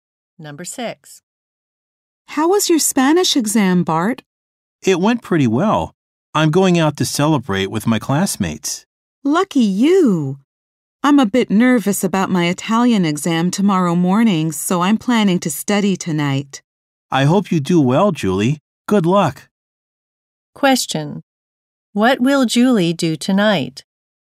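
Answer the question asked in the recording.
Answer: Study for her Italian exam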